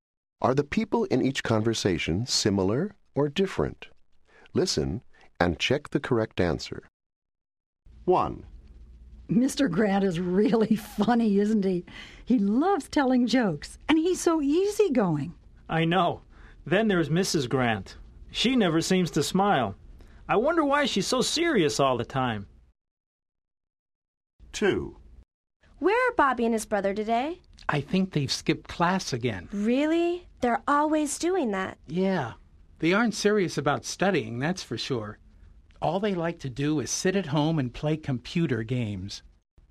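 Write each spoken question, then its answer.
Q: Are the people in each conversation similar or different?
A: different

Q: Are the people in each conversation similar or different?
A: similar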